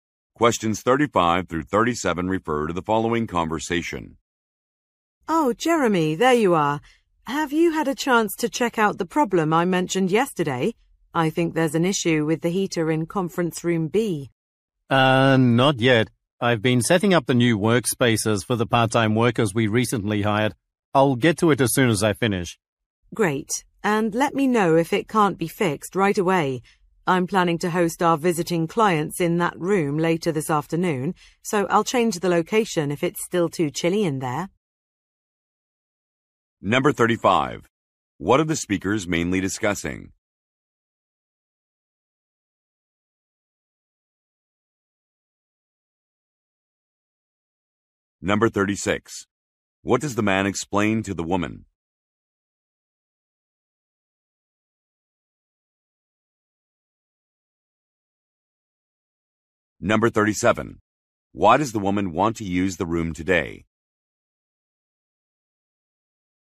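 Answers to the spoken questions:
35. A problem with the heater in a conference room
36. He has been setting up workspaces for new part-time workers
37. To host visiting clients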